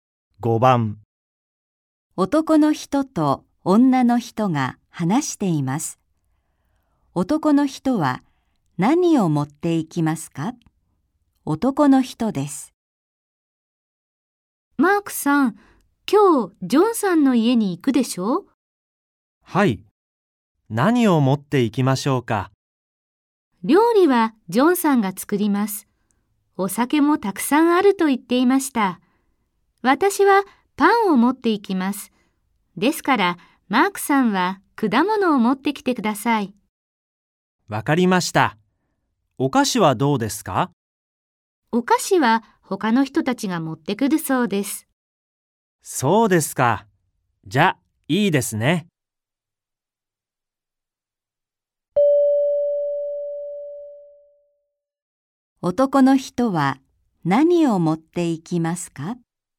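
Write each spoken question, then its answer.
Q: 男の人は何を持っていきますか?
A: 果物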